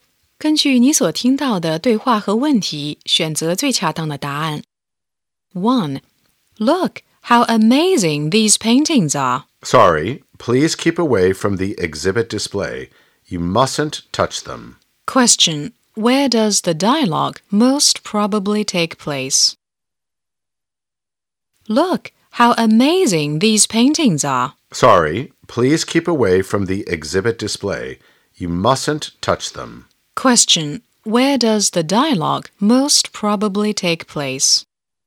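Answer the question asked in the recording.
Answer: In a museum or exhibition hall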